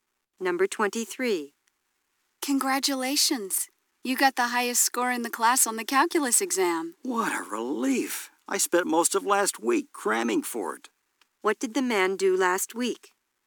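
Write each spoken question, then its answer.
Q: What did the man do last week?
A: He studied hard for the calculus exam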